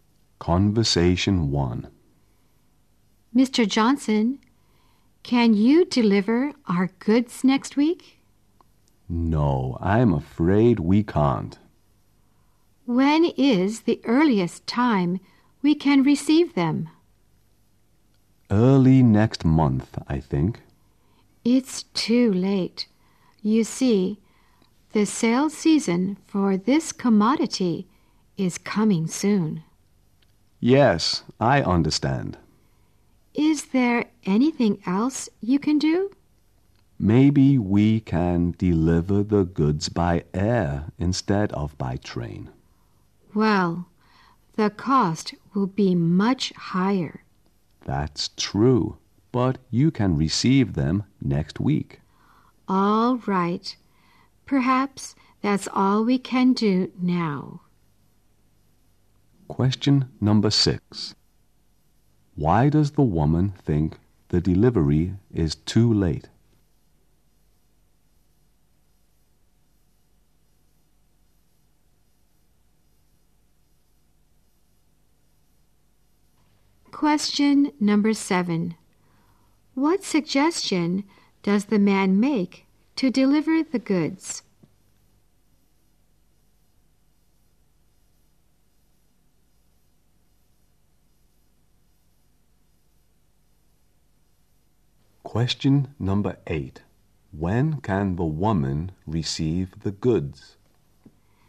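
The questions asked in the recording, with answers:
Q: Why does the woman think the delivery is too late?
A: The sales season is coming soon.

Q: What suggestion does the man make to deliver the goods?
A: Deliver them by air instead of by train.

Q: When can the woman receive the goods?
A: Next week.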